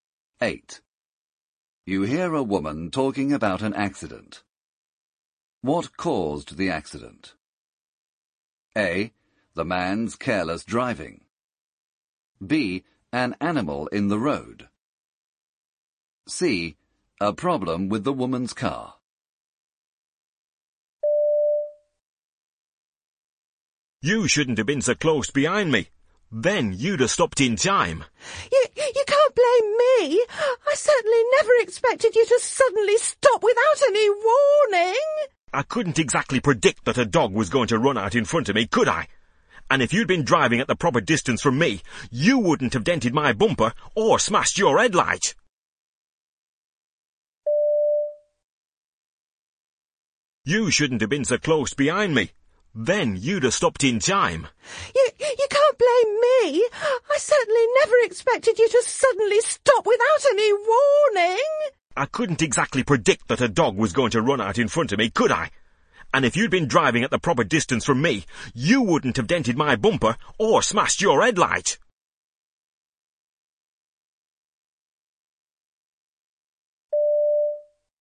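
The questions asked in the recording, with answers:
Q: What caused the accident?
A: B: An animal in the road.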